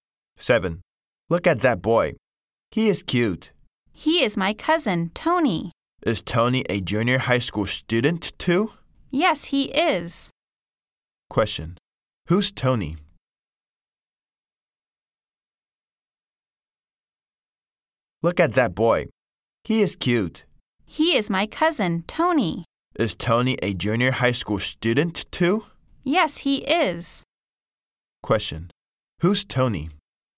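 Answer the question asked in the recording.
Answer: The speaker's cousin, a junior high school student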